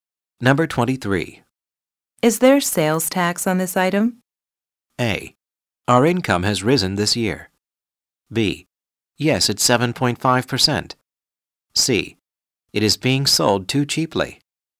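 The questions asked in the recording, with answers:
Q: Is there sales tax on this item?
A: B: Yes, it's 7.5%.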